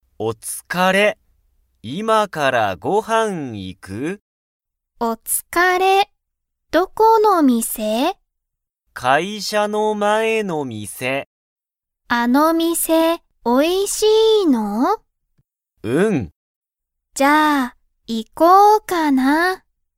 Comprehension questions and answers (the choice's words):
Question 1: その店(みせ)は____。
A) 面白(おもしろ)い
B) 高(たか)い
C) おいしい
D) 長(なが)い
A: おいしい

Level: Level 1